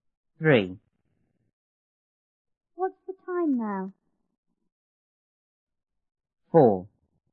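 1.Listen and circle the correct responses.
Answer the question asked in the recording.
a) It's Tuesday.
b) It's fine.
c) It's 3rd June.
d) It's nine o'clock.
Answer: d) It's nine o'clock.

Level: 初中英语广州版1B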